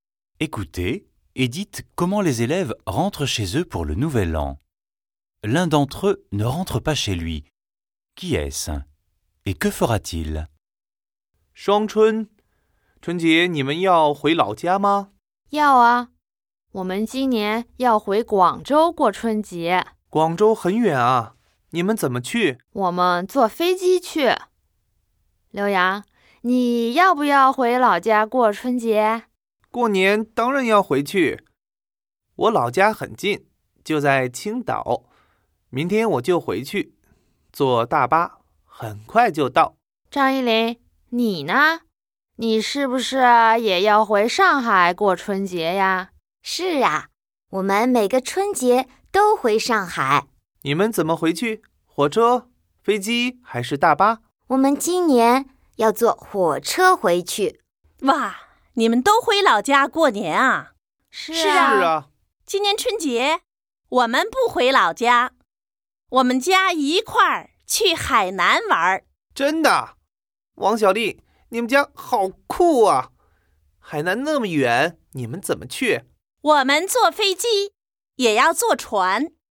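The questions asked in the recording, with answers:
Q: Qui est-ce? Et que fera-t-il?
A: Wang Xiaoli : sa famille ne rentre pas, elle va visiter Hainan pour le Nouvel An (en avion puis en bateau)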